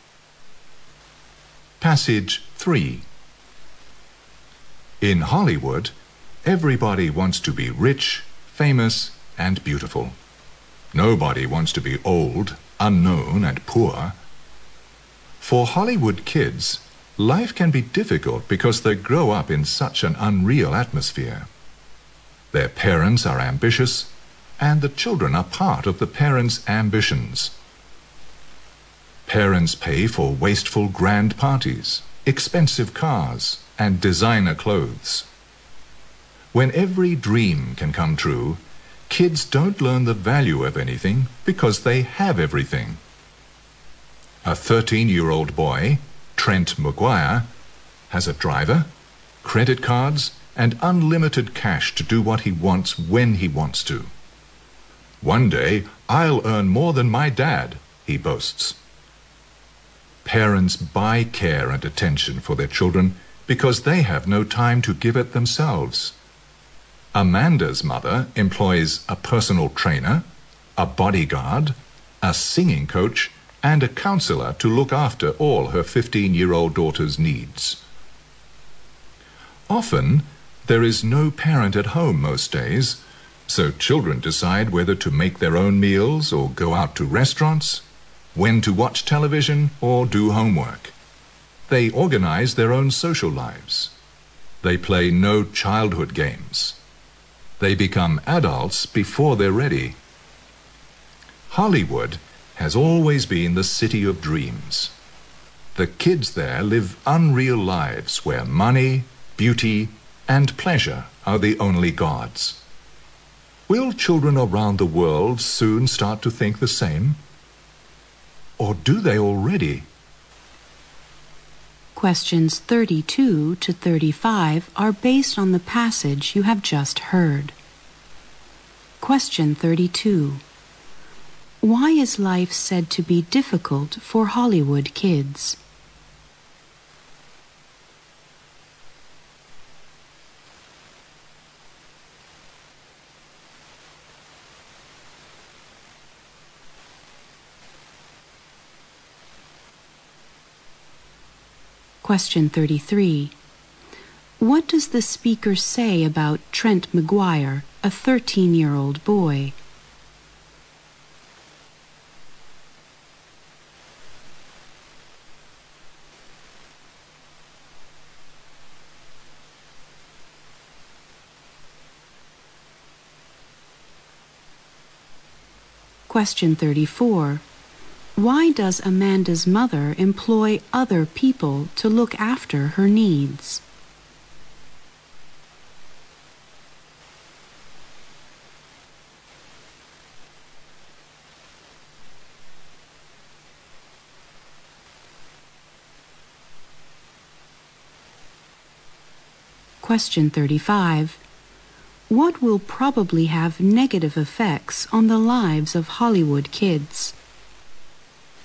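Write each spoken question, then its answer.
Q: Why is life said to be difficult for Hollywood kids?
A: They grow up in an unreal atmosphere.

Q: What does the speaker say about Trent McGuire, a 13-year-old boy?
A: He has a driver, credit cards and unlimited cash, and boasts he'll earn more than his dad.

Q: Why does Amanda's mother employ other people to look after her needs?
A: She has no time to look after her daughter herself.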